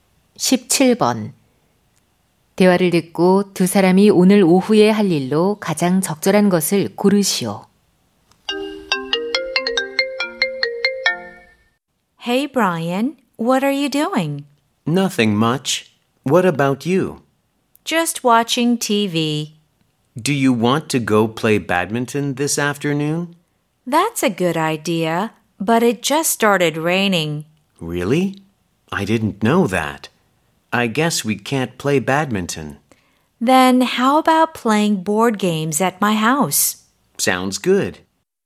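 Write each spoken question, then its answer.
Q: 대화를 듣고 두 사람이 오늘 오후에 할 일로 가장 적절한 것을 고르시오.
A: 보드게임 하기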